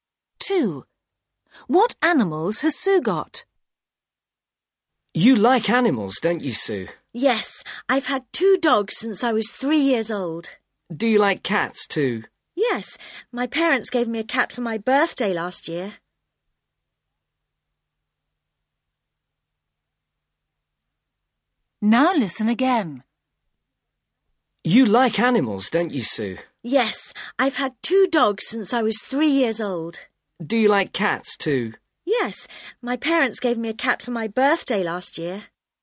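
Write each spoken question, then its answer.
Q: What animals has Sue got?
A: two dogs and a cat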